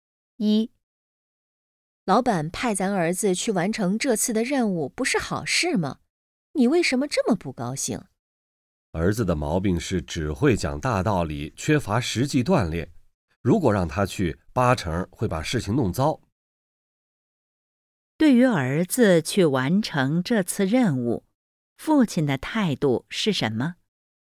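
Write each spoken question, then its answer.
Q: 对于儿子去完成这次任务,父亲的态度是什么?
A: 不放心,担心儿子会把事情弄糟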